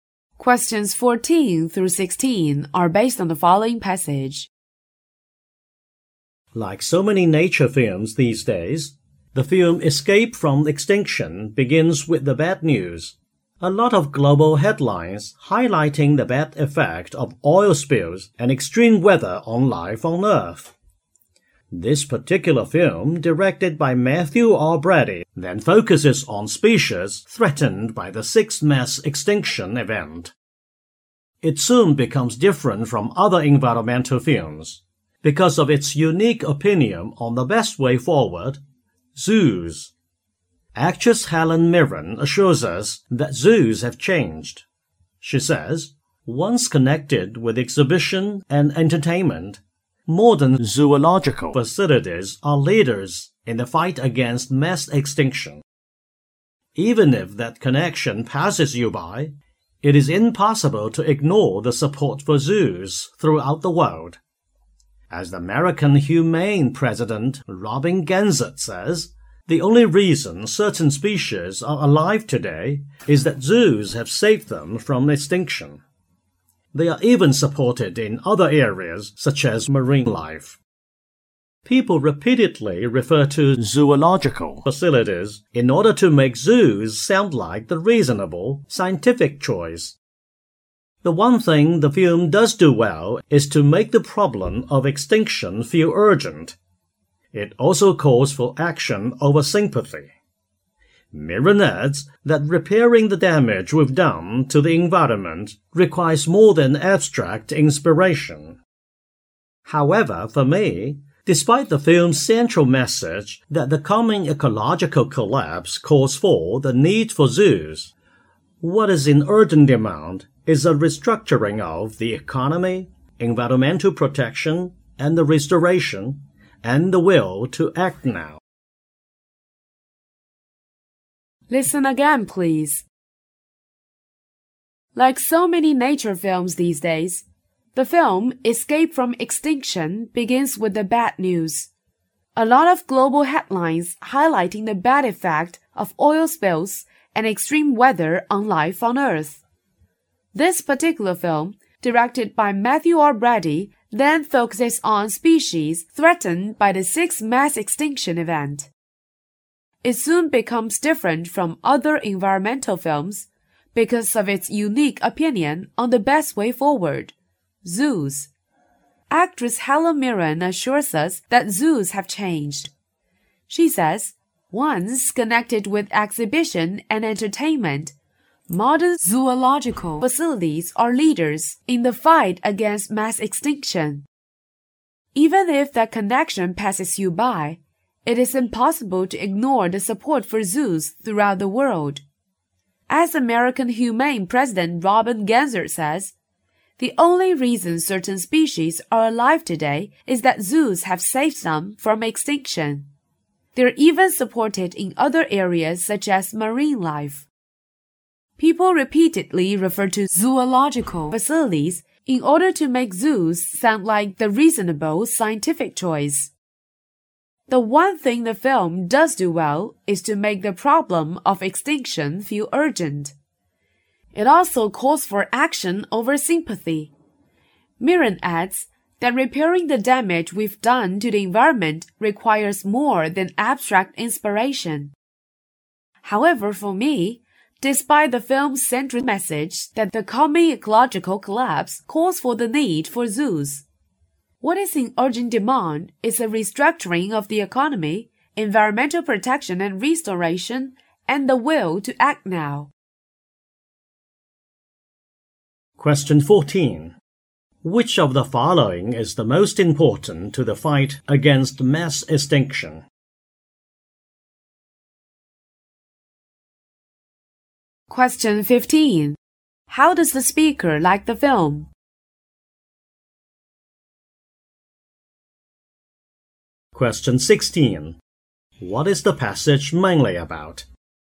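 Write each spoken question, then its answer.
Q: What is the passage mainly about?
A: A review of the film Escape from Extinction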